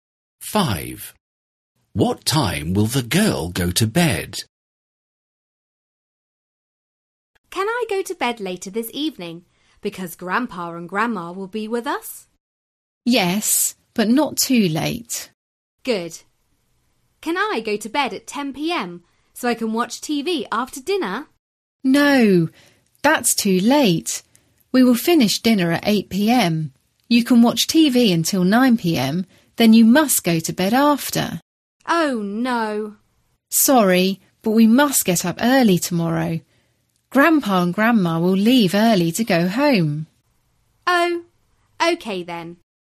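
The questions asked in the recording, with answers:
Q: What time will the girl go to bed?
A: 9 p.m.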